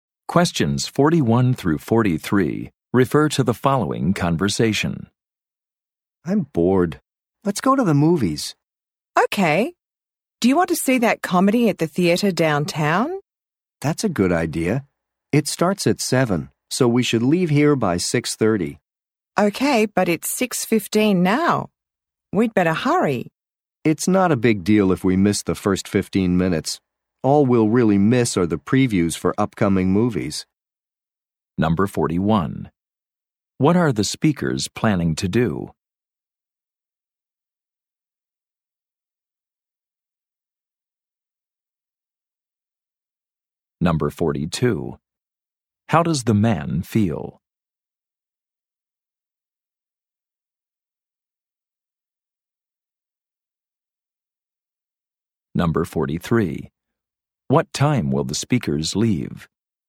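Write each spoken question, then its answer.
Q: What are the speakers planning to do?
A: Go to the movies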